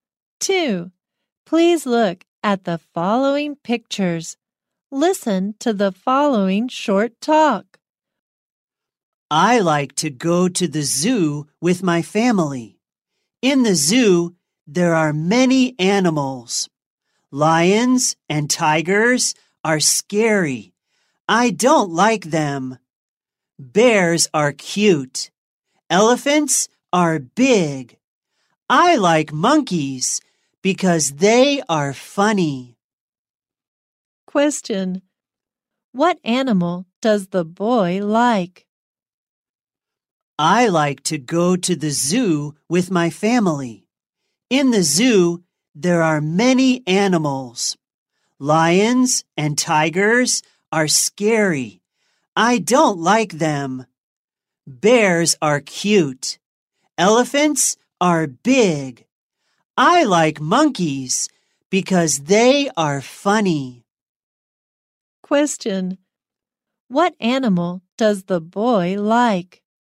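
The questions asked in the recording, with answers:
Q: What animal does the boy like?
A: Monkeys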